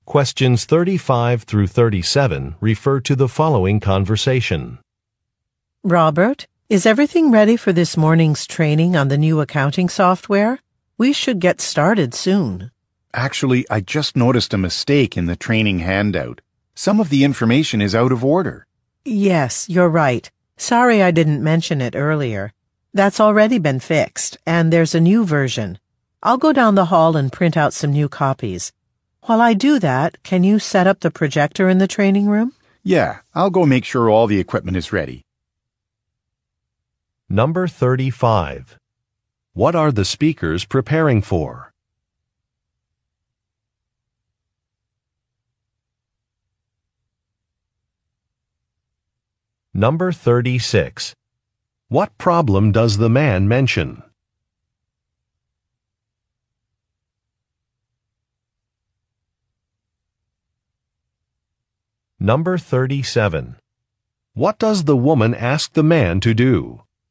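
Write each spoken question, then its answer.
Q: What are the speakers preparing for?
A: A training session on new accounting software

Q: What problem does the man mention?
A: The training handout has a mistake; some information is out of order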